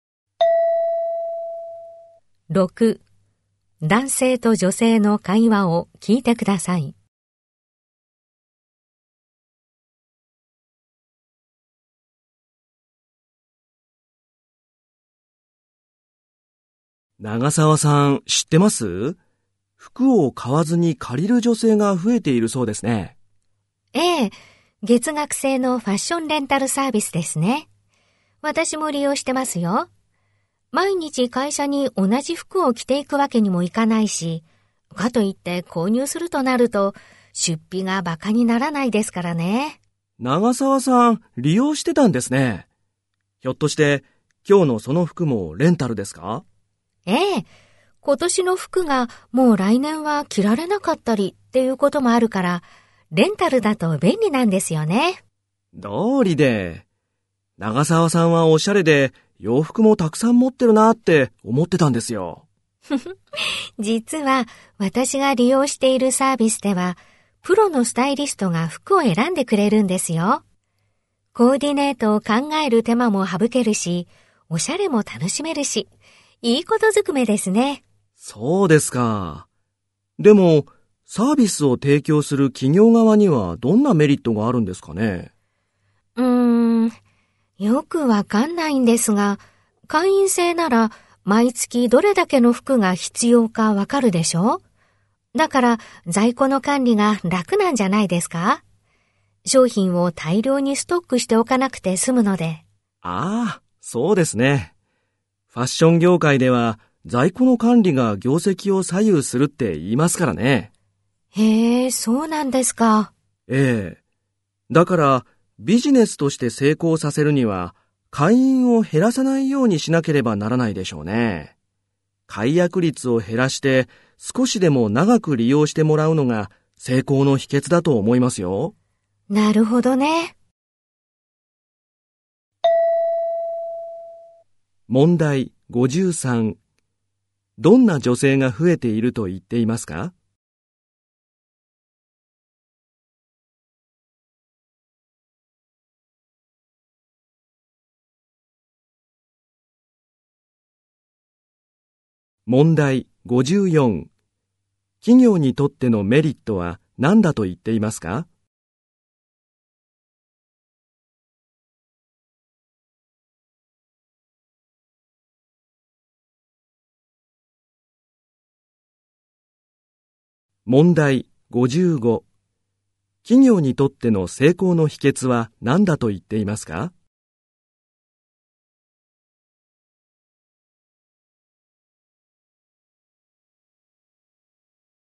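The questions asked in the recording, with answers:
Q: どんな女性が増えていると言っていますか?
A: 服を買わずに借りる女性

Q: 企業にとってのメリットは何だと言っていますか?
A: 在庫の管理が楽になること

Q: 企業にとっての成功の秘訣は何だと言っていますか?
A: 解約率を減らして長く利用してもらうこと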